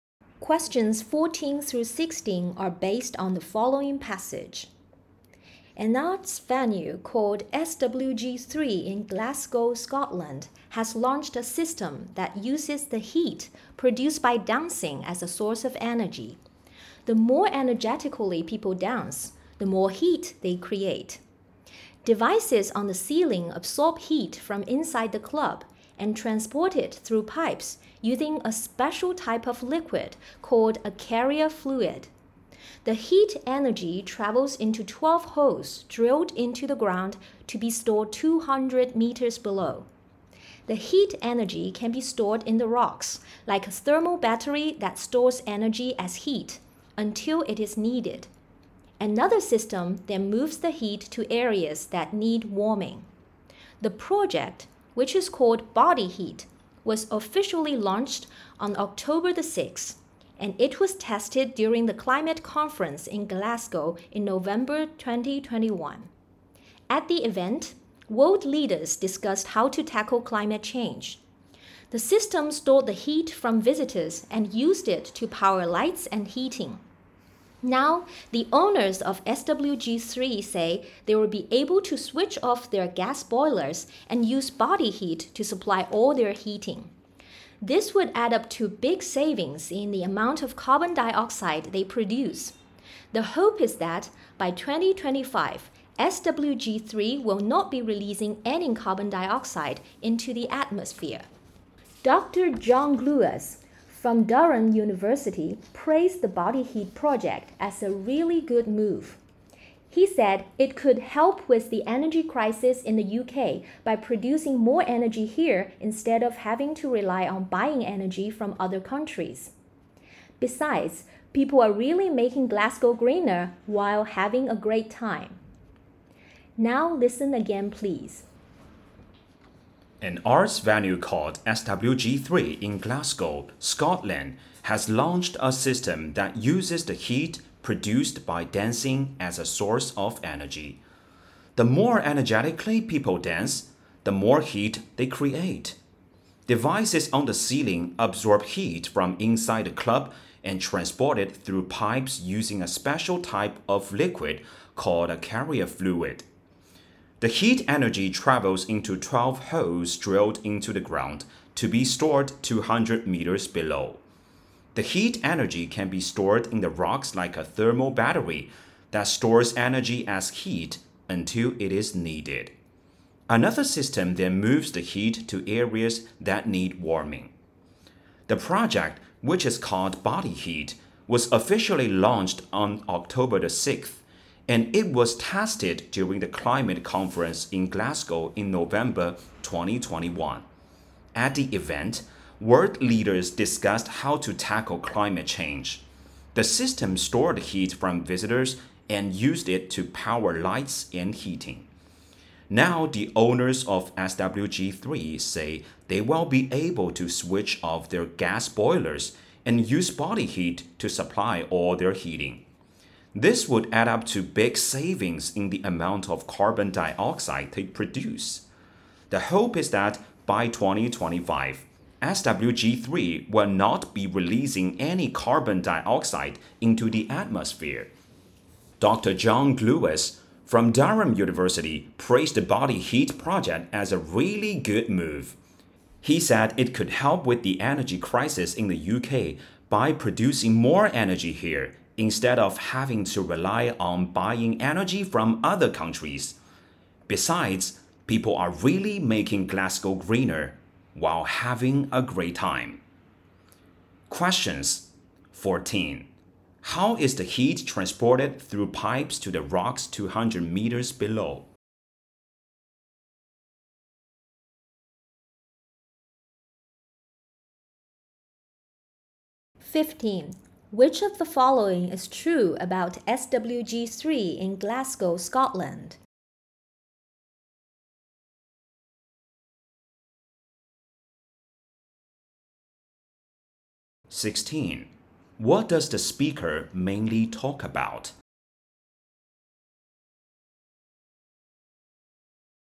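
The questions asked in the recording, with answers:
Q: How is the heat transported through pipes to the rocks 200 meters below?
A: By a special liquid called a carrier fluid

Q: What does the speaker mainly talk about?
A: A system that turns dancers' body heat into energy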